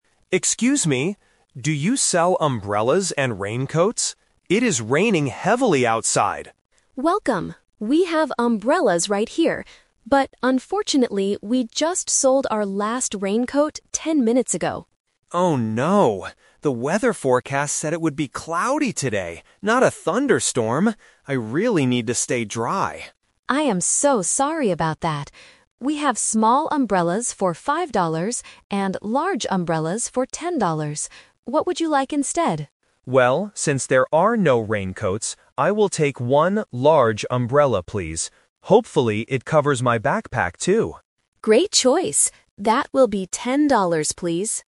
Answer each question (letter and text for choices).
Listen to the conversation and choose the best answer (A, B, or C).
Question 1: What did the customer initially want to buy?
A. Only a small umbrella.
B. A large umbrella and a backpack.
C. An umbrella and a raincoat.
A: C. An umbrella and a raincoat.

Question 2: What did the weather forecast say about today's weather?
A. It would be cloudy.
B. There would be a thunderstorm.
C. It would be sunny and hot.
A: A. It would be cloudy.

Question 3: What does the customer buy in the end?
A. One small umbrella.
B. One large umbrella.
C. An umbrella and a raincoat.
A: B. One large umbrella.

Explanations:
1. The customer runs in and asks, "Do you sell umbrellas and raincoats?" Option (A) is a trap because the clerk mentions small umbrellas later. Option (B) is a trap because the customer mentions their backpack, but they don't want to buy one.
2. The customer explicitly states, "The weather forecast said it would be cloudy today...". Option (B) is the trap because a thunderstorm is the actual weather happening right now, not what the forecast predicted. Option (C) is never mentioned.
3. Because there are no raincoats, the customer changes the plan and says, "I will take one large umbrella, please." Option (A) is a trap because the clerk offered small umbrellas, but the customer rejected them. Option (C) is the trap because it was the customer's initial plan (Plan A).

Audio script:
Customer: Excuse me! Do you sell umbrellas and raincoats? It is raining heavily outside!
Clerk: Welcome! We have umbrellas right here. But unfortunately, we just sold our last raincoat ten minutes ago.
Customer: Oh no. The weather forecast said it would be cloudy today, not a thunderstorm! I really need to stay dry.
Clerk: I am so sorry about that. We have small umbrellas for 5 dollars and large umbrellas for 10 dollars. What would you like instead?
Customer: Well, since there are no raincoats, I will take one large umbrella, please. Hopefully, it covers my backpack too.